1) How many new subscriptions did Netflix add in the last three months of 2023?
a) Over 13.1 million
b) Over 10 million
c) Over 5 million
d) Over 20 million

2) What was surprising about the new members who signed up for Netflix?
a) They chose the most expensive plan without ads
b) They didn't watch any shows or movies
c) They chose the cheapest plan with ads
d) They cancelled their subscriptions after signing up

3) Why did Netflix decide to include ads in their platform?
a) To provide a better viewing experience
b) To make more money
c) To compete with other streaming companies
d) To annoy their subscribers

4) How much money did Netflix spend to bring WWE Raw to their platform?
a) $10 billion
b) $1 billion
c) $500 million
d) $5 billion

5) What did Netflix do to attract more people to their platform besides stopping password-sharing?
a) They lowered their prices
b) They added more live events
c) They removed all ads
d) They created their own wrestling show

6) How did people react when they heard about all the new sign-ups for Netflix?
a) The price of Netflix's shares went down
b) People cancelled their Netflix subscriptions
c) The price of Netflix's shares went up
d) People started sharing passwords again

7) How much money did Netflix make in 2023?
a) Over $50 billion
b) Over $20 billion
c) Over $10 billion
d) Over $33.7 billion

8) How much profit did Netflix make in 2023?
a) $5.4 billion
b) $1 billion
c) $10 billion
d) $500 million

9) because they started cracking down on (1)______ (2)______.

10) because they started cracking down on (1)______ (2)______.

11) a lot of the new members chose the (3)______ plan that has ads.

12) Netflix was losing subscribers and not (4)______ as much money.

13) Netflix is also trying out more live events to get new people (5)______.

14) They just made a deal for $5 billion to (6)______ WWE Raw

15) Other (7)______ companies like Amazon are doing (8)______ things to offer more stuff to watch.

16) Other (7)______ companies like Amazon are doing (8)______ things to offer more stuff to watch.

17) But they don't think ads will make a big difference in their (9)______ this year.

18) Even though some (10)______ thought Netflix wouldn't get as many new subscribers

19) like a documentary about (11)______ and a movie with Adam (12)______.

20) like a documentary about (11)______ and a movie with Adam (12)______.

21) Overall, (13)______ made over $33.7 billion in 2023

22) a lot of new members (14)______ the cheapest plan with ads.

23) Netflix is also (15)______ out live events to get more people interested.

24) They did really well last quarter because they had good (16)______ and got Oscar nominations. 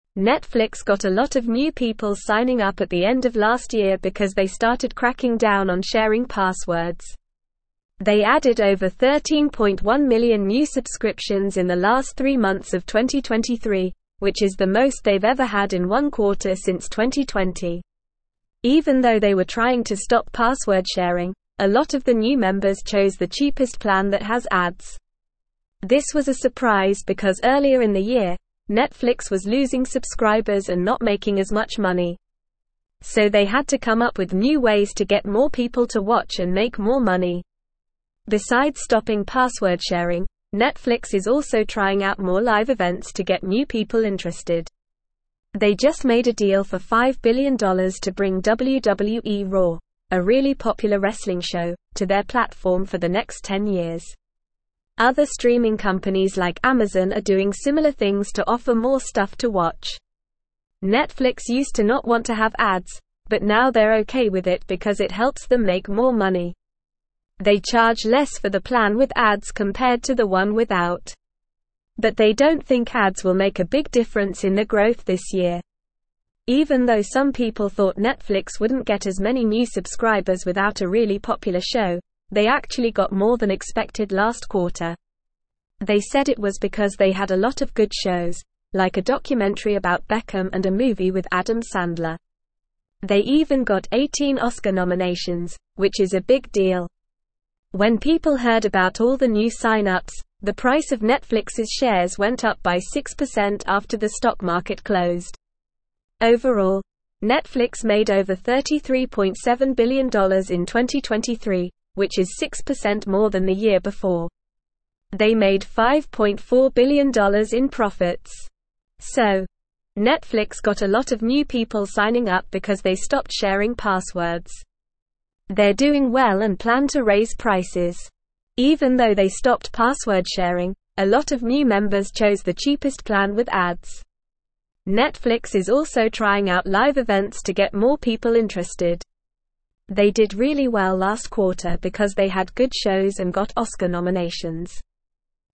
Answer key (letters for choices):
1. a
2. c
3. b
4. d
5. b
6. c
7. d
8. a
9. sharing
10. passwords
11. cheapest
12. making
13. interested
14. bring
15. streaming
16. similar
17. growth
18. people
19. Beckham
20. Sandler
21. Netflix
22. chose
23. trying
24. shows

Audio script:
Netflix got a lot of new people signing up at the end of last year because they started cracking down on sharing passwords. They added over 13.1 million new subscriptions in the last three months of 2023, which is the most they've ever had in one quarter since 2020. Even though they were trying to stop password-sharing, a lot of the new members chose the cheapest plan that has ads. This was a surprise because earlier in the year, Netflix was losing subscribers and not making as much money. So they had to come up with new ways to get more people to watch and make more money.
Besides stopping password-sharing, Netflix is also trying out more live events to get new people interested. They just made a deal for $5 billion to bring WWE Raw, a really popular wrestling show, to their platform for the next 10 years. Other streaming companies like Amazon are doing similar things to offer more stuff to watch. Netflix used to not want to have ads, but now they're okay with it because it helps them make more money. They charge less for the plan with ads compared to the one without. But they don't think ads will make a big difference in their growth this year.
Even though some people thought Netflix wouldn't get as many new subscribers without a really popular show, they actually got more than expected last quarter. They said it was because they had a lot of good shows, like a documentary about Beckham and a movie with Adam Sandler. They even got 18 Oscar nominations, which is a big deal. When people heard about all the new sign-ups, the price of Netflix's shares went up by 6% after the stock market closed. Overall, Netflix made over $33.7 billion in 2023, which is 6% more than the year before. They made $5.4 billion in profits.
They're doing well and plan to raise prices. They did really well last quarter because they had good shows and got Oscar nominations.

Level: Level 3